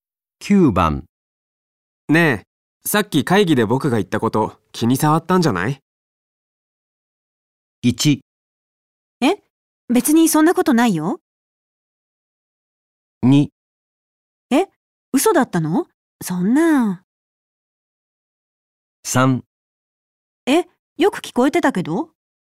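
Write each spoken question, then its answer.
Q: ねえ、さっき会議で僕が言ったこと気に障ったんじゃない?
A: 1: え?別にそんなことないよ。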